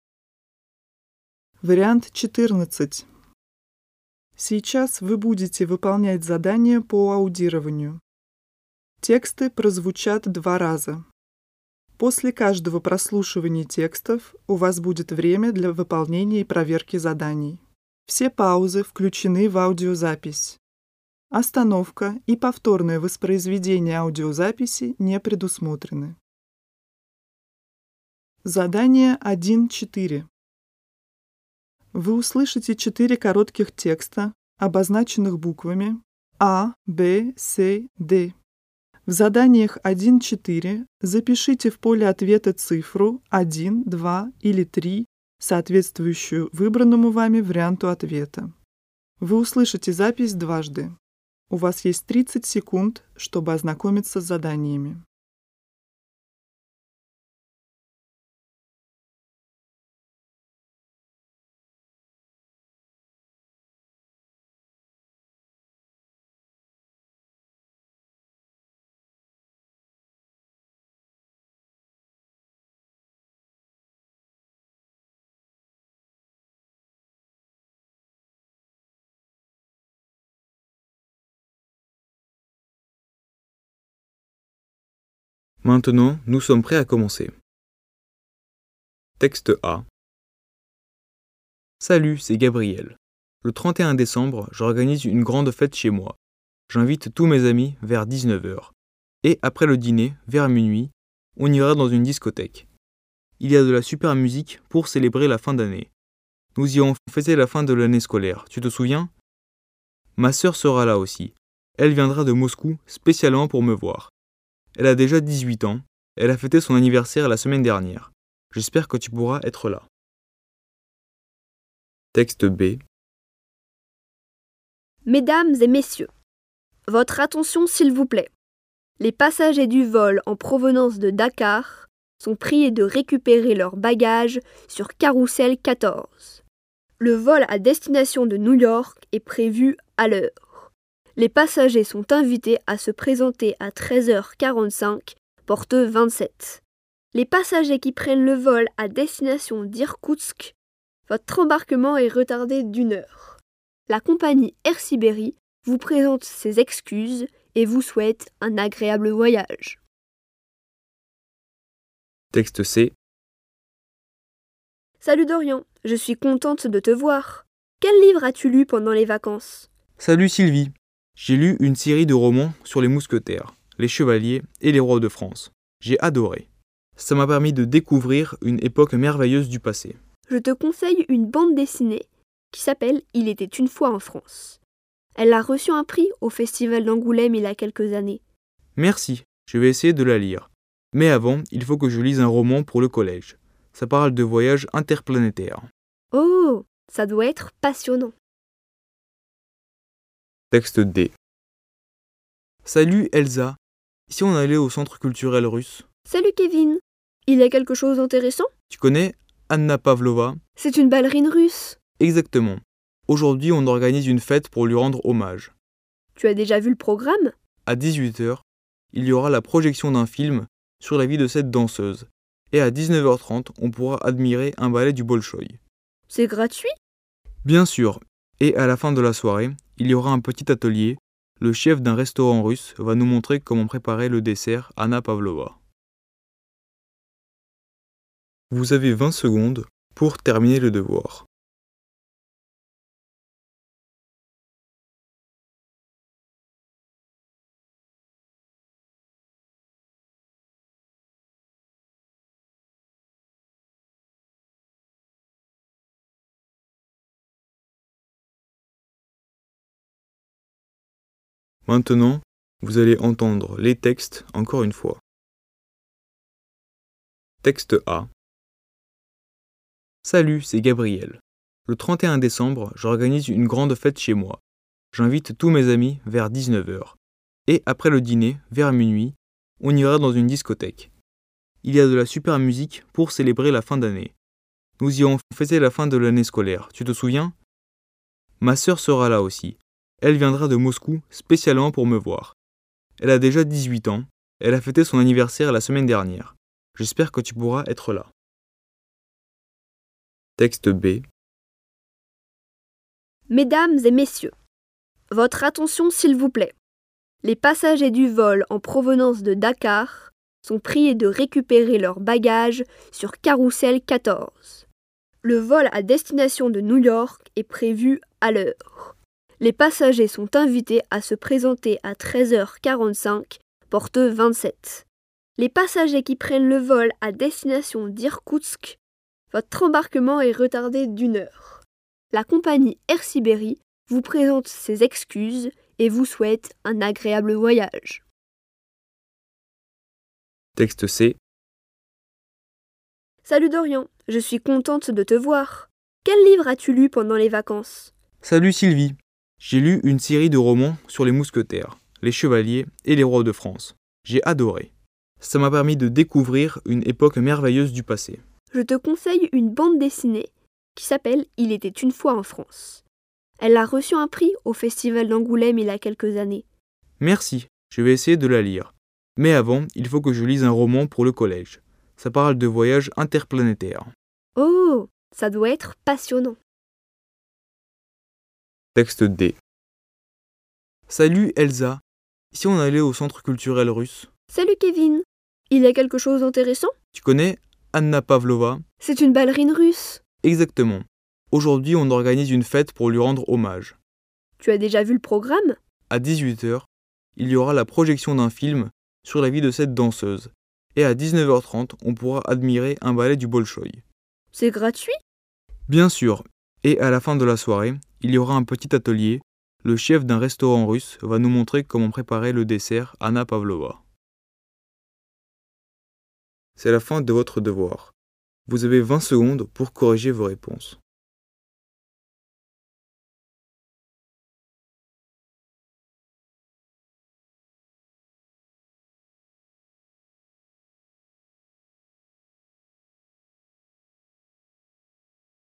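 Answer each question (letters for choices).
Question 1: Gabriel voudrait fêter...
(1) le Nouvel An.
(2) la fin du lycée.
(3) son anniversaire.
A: 1

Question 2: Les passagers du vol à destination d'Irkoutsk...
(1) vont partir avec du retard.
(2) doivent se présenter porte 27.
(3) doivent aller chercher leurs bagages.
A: 1

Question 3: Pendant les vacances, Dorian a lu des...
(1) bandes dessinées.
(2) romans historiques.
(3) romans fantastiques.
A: 2

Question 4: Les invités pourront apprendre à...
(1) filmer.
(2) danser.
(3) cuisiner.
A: 3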